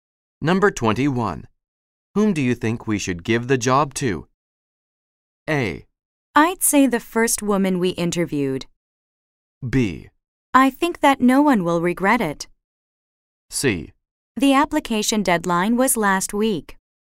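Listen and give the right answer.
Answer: A: I'd say the first woman we interviewed.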